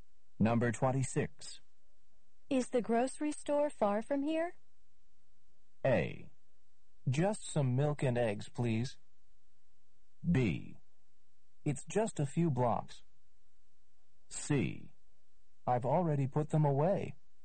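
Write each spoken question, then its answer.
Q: Is the grocery store far from here?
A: B: It's just a few blocks.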